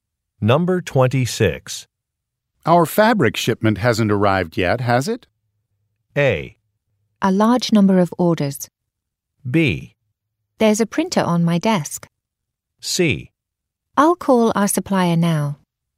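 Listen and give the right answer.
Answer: C: I'll call our supplier now.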